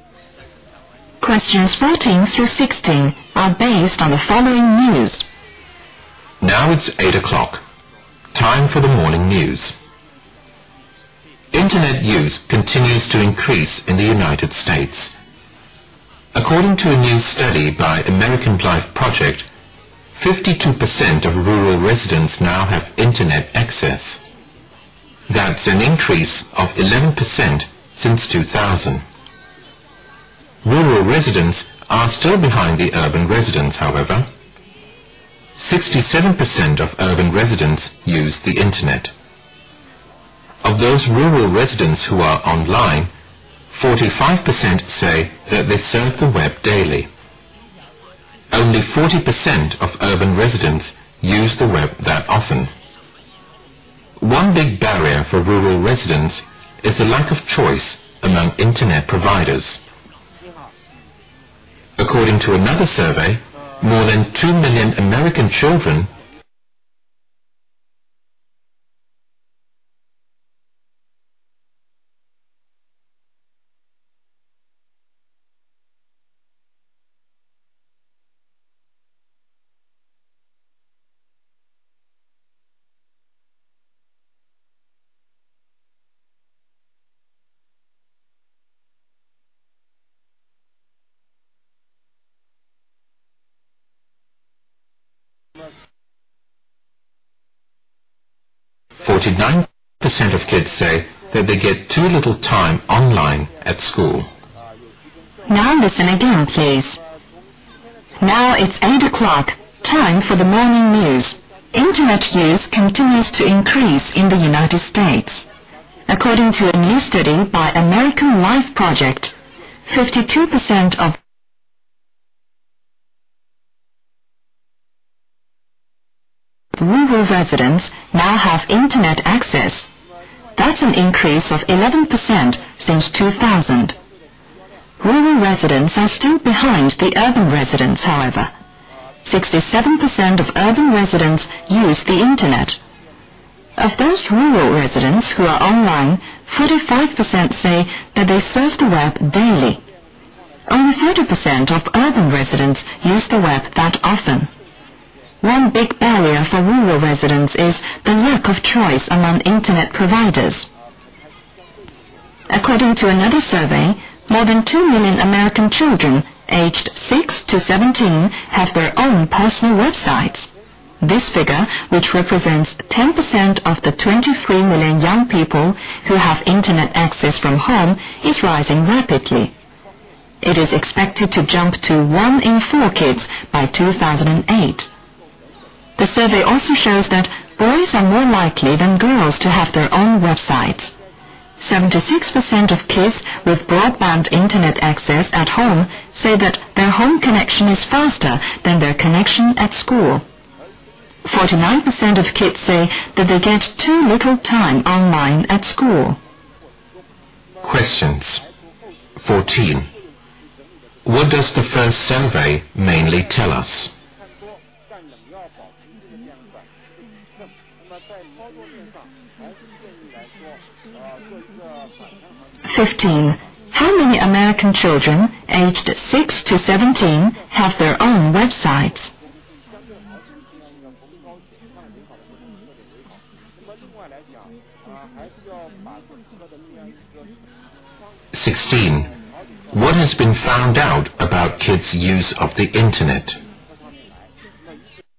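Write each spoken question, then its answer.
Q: What does the first survey mainly tell us?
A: Internet use among rural residents is increasing

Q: How many American children aged 6 to 17 have their own websites?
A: More than 2 million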